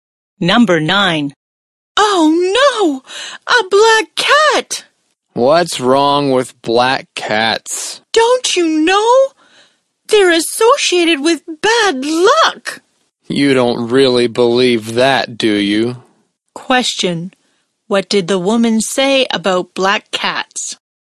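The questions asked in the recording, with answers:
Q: What did the woman say about black cats?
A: They're associated with bad luck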